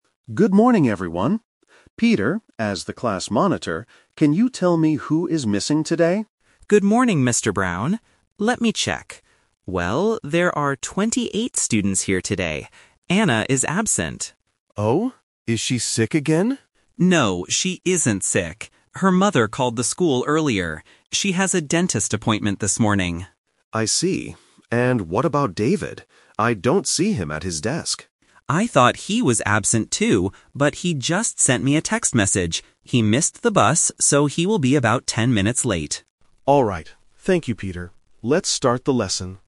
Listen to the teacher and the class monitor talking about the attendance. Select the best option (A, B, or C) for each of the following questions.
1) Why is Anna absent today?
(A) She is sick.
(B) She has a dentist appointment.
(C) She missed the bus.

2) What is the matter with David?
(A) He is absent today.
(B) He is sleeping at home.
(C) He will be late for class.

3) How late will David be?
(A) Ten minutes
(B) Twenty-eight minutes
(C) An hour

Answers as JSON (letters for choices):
{"1": "B", "2": "C", "3": "A"}

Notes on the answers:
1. Peter clearly states the reason for Anna's absence: "She has a dentist appointment this morning."
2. Peter says about David, "...he will be about ten minutes late."
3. Peter says that David "will be about ten minutes late."

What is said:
Mr. Brown: Good morning, everyone. Peter, as the class monitor, can you tell me who is missing today?
Peter: Good morning, Mr. Brown. Let me check... Well, there are 28 students here today. Anna is absent.
Mr. Brown: Oh? Is she sick again?
Peter: No, she isn't sick. Her mother called the school earlier. She has a dentist appointment this morning.
Mr. Brown: I see. And what about David? I don't see him at his desk.
Peter: I thought he was absent too, but he just sent me a text message. He missed the bus, so he will be about ten minutes late.